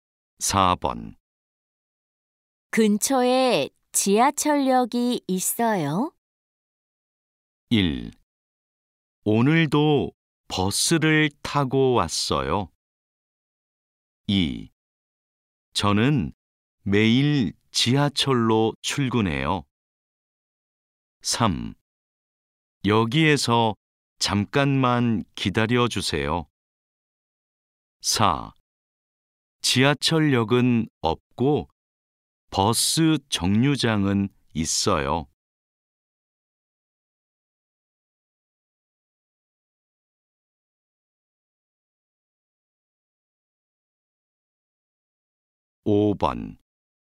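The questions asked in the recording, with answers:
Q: 근처에 지하철역이 있어요?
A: 4: 지하철역은 없고 버스 정류장은 있어요.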